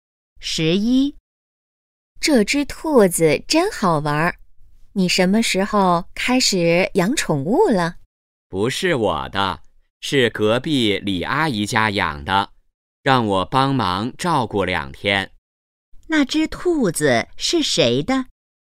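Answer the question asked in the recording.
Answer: 隔壁李阿姨家的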